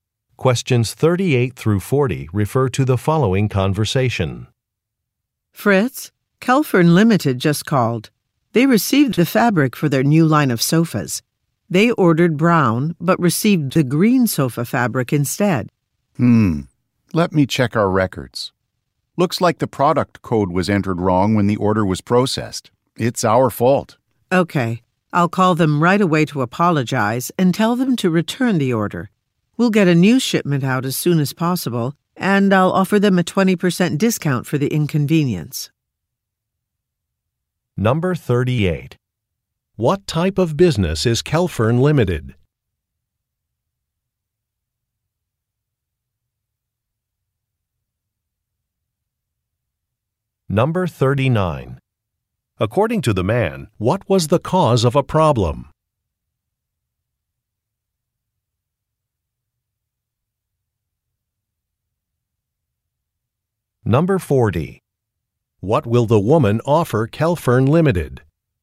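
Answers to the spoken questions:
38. A furniture (sofa) maker
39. A product code was entered wrong
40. A 20% discount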